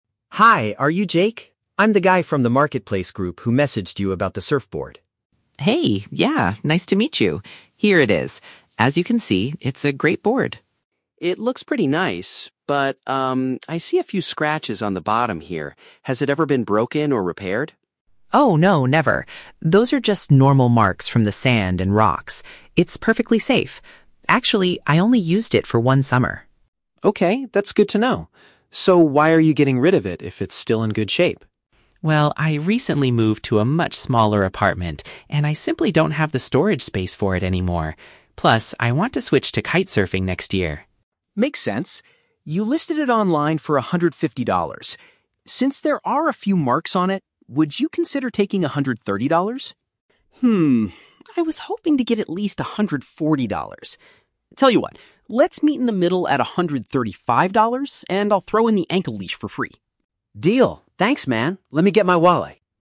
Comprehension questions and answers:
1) What is the buyer's initial concern about the surfboard?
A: He notices some minor damage on the surface.

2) What is the main reason the seller is offering the surfboard?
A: He lacks enough room to keep it at his current home.

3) How do the two men resolve the discussion about the price?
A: They agree on a compromised price with an extra item included.

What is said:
Tom: Hi, are you Jake? I'm the guy from the marketplace group who messaged you about the surfboard.
Jake: Hey, yeah! Nice to meet you. Here it is. As you can see, it's a great board.
Tom: It looks pretty nice. I see a few scratches on the bottom here. Has it ever been broken or repaired?
Jake: Oh, no, never. Those are just normal marks from the sand and rocks. It's perfectly safe. Actually, I only used it for one summer.
Tom: Okay, that's good to know. So, why are you getting rid of it if it's still in good shape?
Jake: Well, I recently moved to a much smaller apartment, and I simply don't have the storage space for it anymore. Plus, I want to switch to kite-surfing next year.
Tom: Makes sense. You listed it online for $150. Since there are a few marks on it, would you consider taking $130?
I was hoping to get at least $140. Tell you what, let's meet in the middle at $135, and I'll throw in the ankle leash for free.
Tom: Deal! Thanks, man. Let me get my wallet.